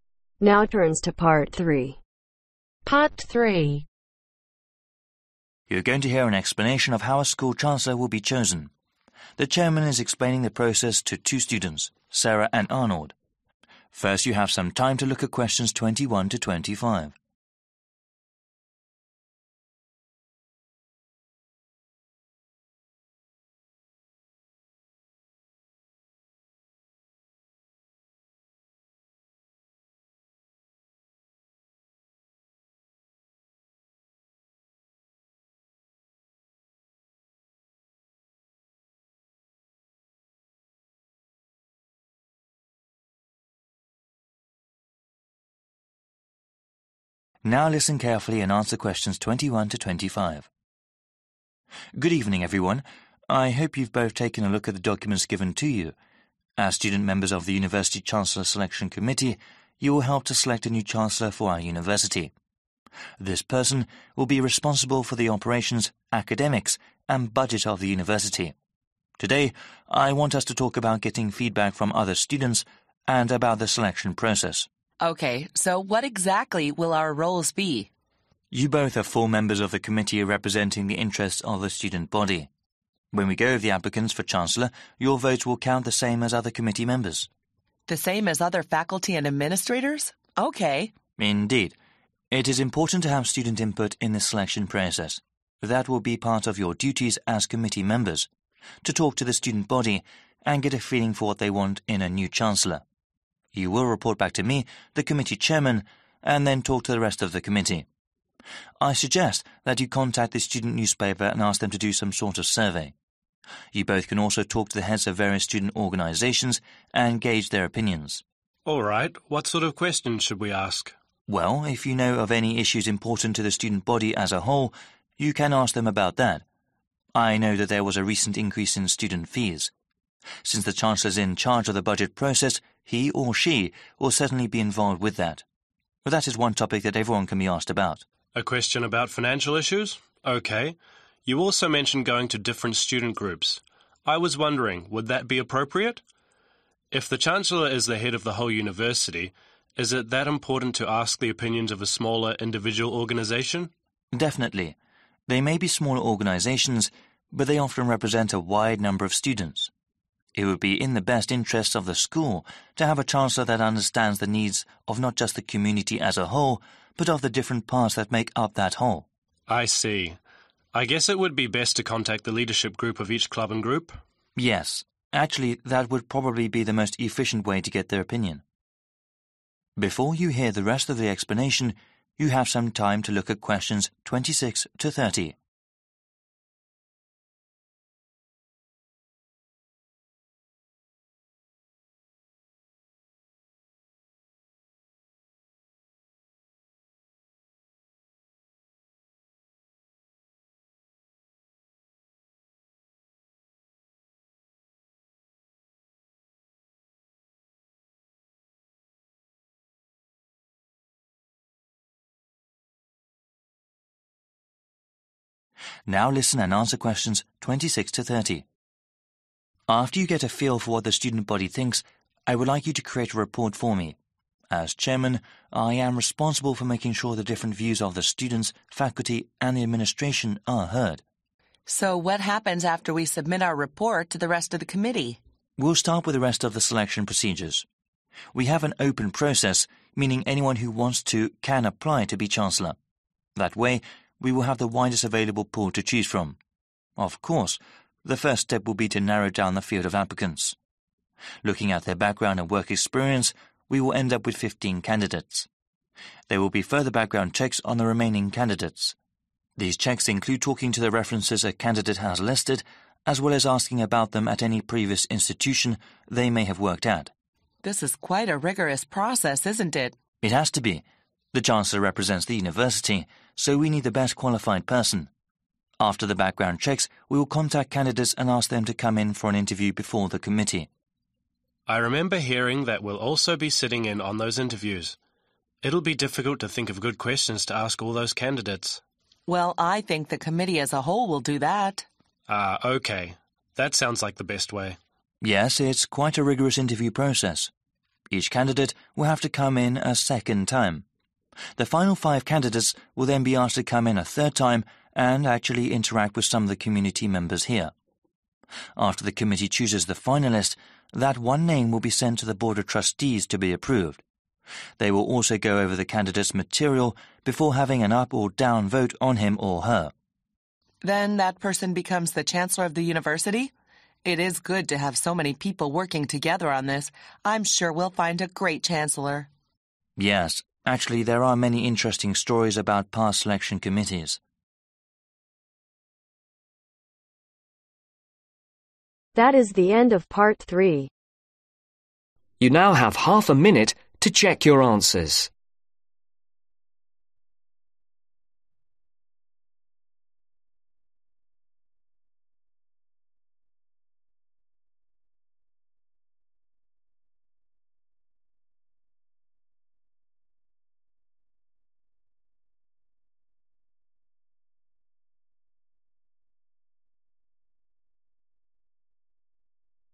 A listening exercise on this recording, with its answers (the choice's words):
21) At the start of the talk, one responsibility of the University Chancellor mentioned is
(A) increasing school loyalty.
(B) making sure money is spend in the right places.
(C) beautifying the campus.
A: making sure money is spend in the right places.

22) In the selection committee, the students members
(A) have little to no role in the selection process.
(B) have a greater say in who should be chancellor.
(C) have the same weight as others.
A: have the same weight as others.

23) After giving a reporting to the committee chairman, the students will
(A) vote on a new chancellor.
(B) talk to other members as well.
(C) give to their roles to new students.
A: talk to other members as well.

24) The chairman recommend that the students ask questions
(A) that deal with topics important to everyone.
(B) that are important only to the administration.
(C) an academic hiring.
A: that deal with topics important to everyone.

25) The chancellor needs to understand the needs of the whole community and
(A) not much else.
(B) the needs of their similar Institutions.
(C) also the needs of those that make up that community.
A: also the needs of those that make up that community.

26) The selection process is a/an (26)............ process, meaning anyone can apply for the position.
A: Open

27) There will be (27)............ different candidate chosen from the initial pool of applicants.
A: 15/fifteen

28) After those are done, they will be asked to come in for a/an (28)............ before the committee.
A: Interview

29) They will also have to come in for a (29)............ time.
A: Second/2nd

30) The final candidates have to interact with same (30)............ before on name is chosen by the committee and voted on by the board of Trustees.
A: Community members